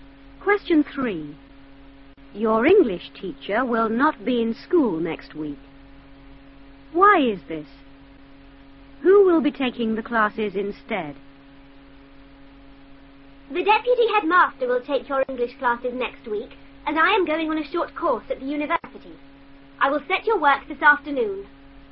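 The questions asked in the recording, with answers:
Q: Why is this?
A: She is going on a short course at the university

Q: Who will be taking the classes instead?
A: The deputy headmaster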